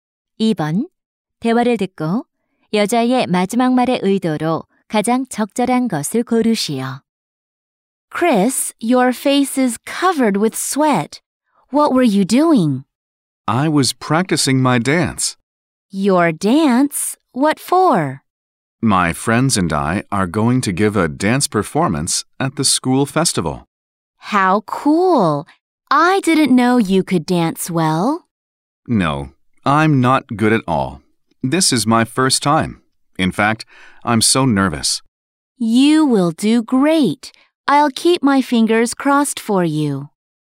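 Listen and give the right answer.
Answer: 격려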